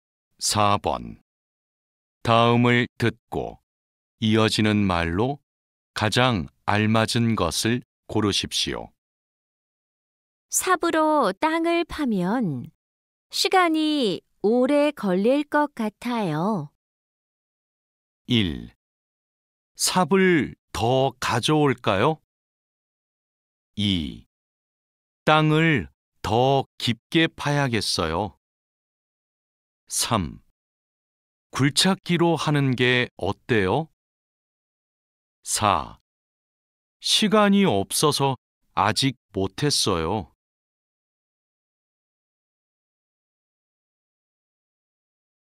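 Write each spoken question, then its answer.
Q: 삽으로 땅을 파면 시간이 오래 걸릴 것 같아요.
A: 3: 굴착기로 하는 게 어때요?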